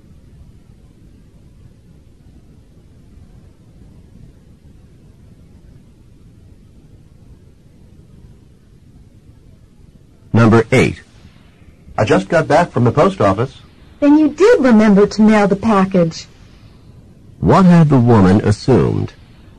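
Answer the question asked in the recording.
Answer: That the man would forget to mail the package.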